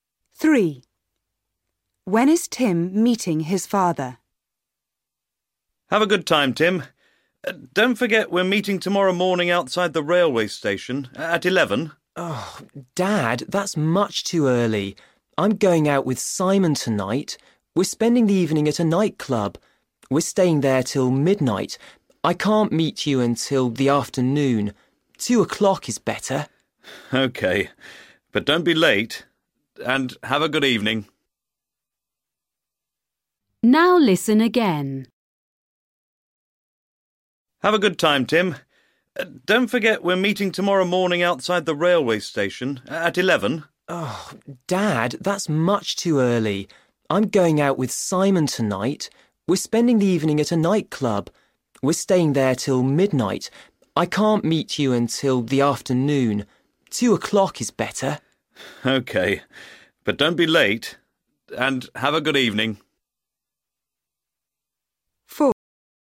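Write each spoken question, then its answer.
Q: When is Tim meeting his father?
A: At 2 o'clock tomorrow afternoon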